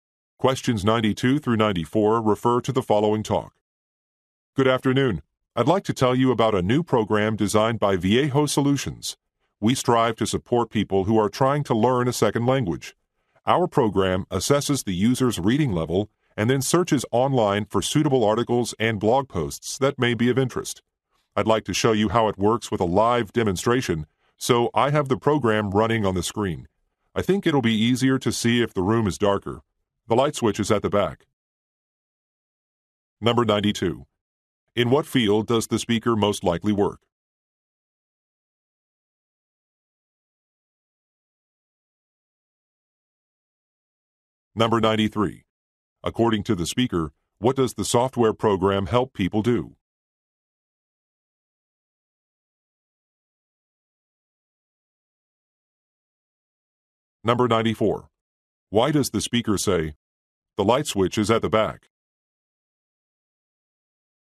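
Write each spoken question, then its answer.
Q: According to the speaker, what does the software program help people do?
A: Learn a second language

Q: Why does the speaker say, "The light switch is at the back"?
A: To ask someone to turn off the lights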